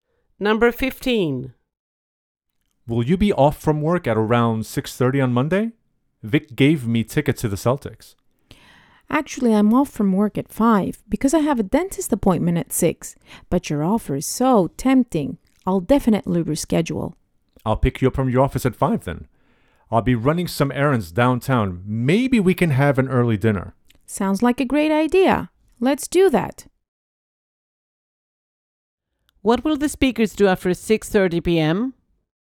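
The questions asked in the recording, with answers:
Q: What will the speakers do after 6:30 p.m.?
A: Go to the Celtics game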